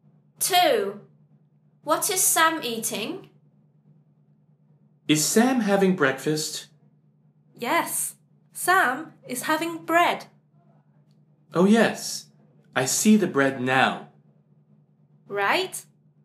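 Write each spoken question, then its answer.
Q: What is Sam eating?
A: bread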